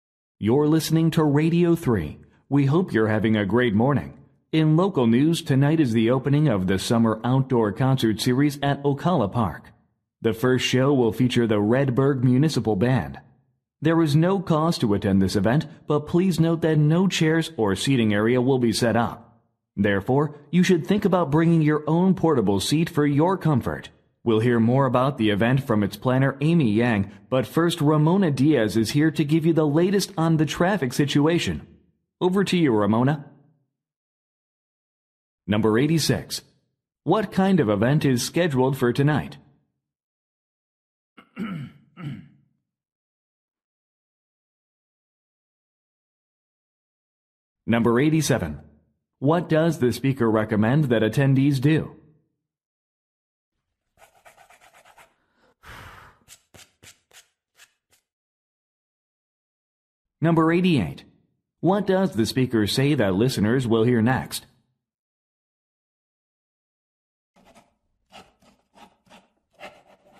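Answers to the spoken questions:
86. An outdoor concert
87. Bring their own portable seats
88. A traffic report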